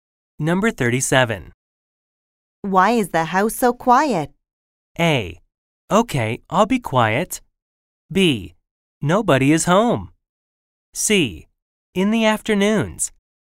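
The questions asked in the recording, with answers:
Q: Why is the house so quiet?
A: B: Nobody is home.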